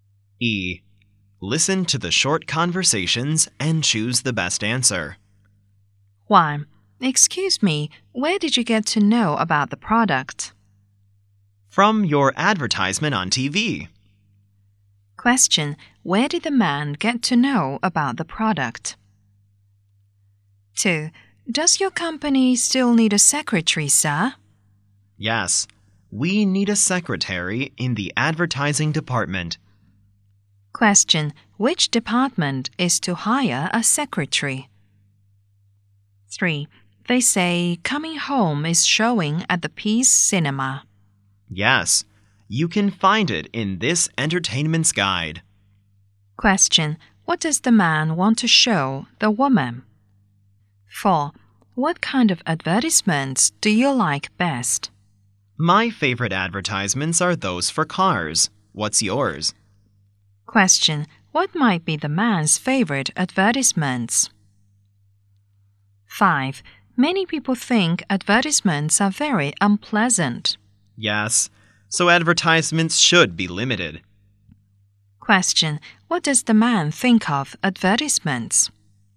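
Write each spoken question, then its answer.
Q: Where did the man get to know about the product?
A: From their advertisement on TV

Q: Which department is to hire a secretary?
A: The advertising department

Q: What does the man want to show the woman?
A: The entertainment guide

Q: What does the man think of advertisements?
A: They should be limited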